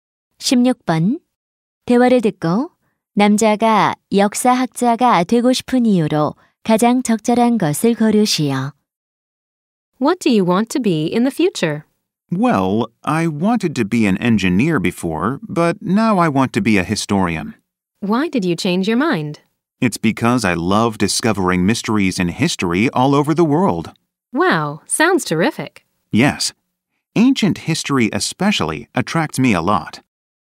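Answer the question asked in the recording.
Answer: 세계 역사 속의 미스터리를 발견하는 것을 좋아해서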